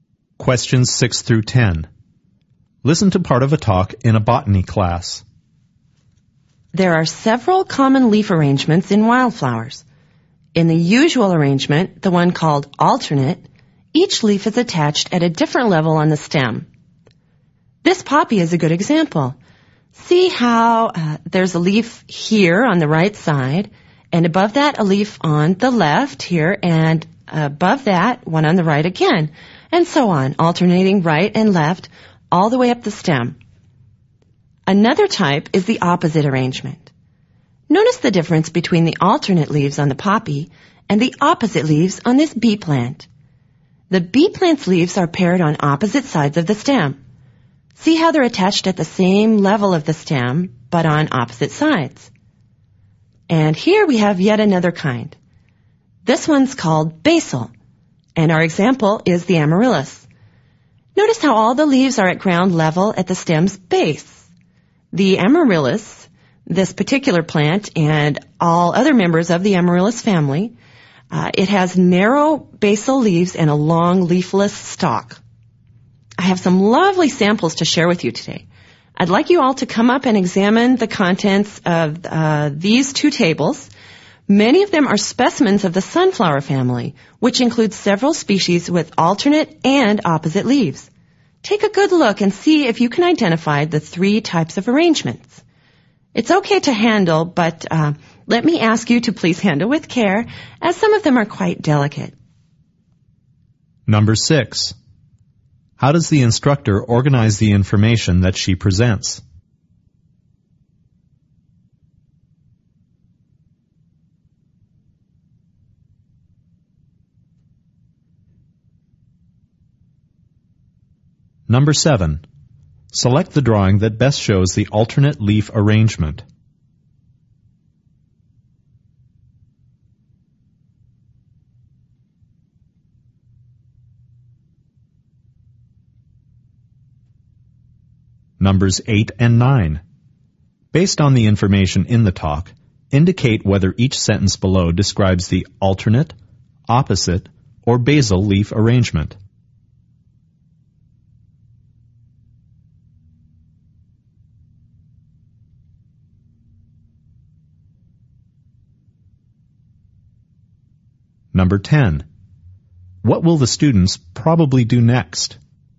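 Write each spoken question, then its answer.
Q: What will the students probably do next?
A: Go up to the tables and examine the plant specimens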